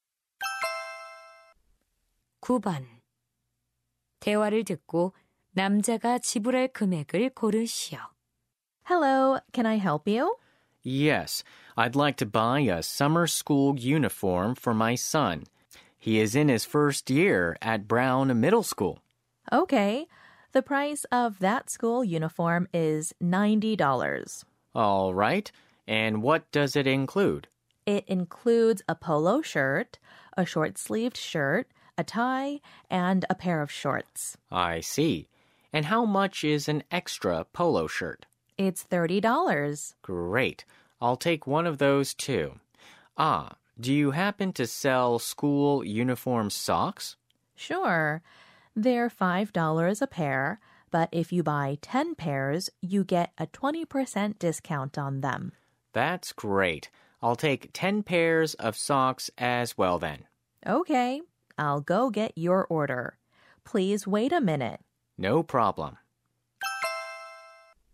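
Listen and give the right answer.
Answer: $160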